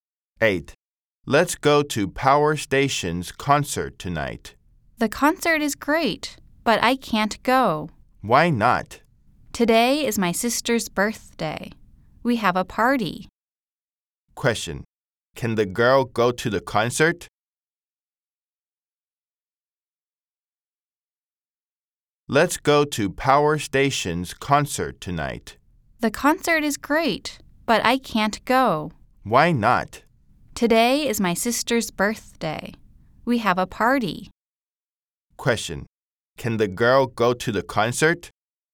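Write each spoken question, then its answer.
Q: Question, can the girl go to the concert?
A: No, it's her sister's birthday party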